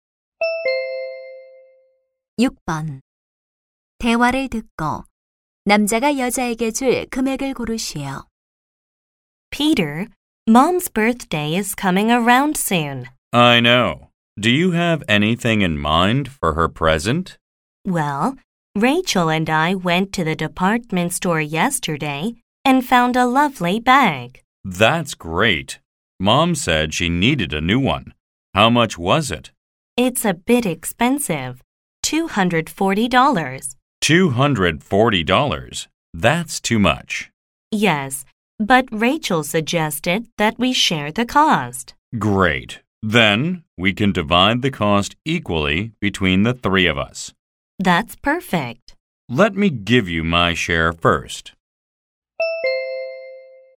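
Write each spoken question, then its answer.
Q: 대화를 듣고 남자가 여자에게 줄 금액을 고르시오.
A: $80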